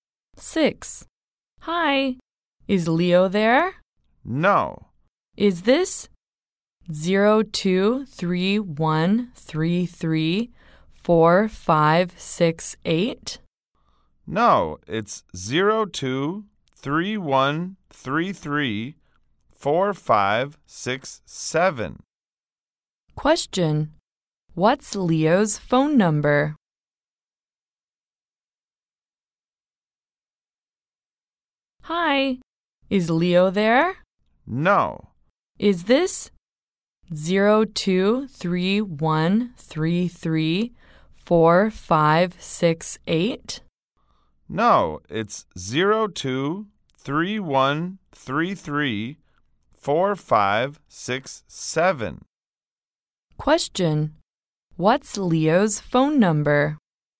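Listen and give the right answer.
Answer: 0231334567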